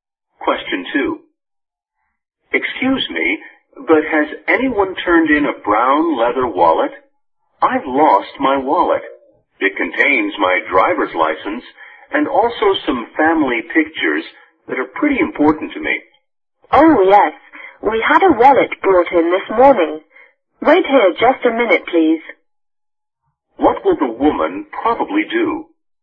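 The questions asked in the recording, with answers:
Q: What will the woman probably do?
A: Go and get the wallet that was brought in so the man can check it.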